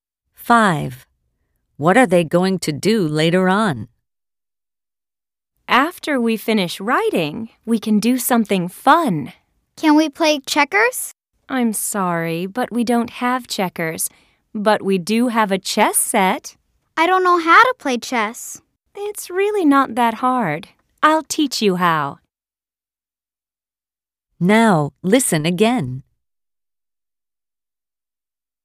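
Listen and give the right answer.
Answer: play chess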